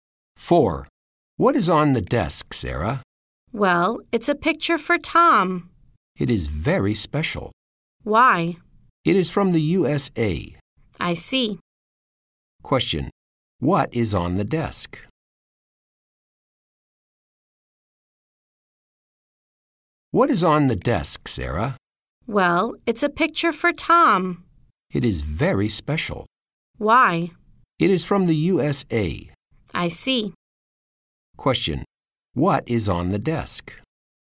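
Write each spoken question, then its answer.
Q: What is on the desk?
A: A picture for Tom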